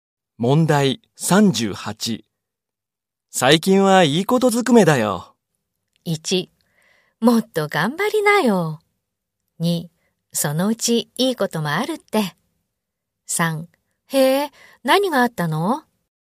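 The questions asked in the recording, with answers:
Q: 最近はいいことずくめだよ。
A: 3: へえ、何があったの?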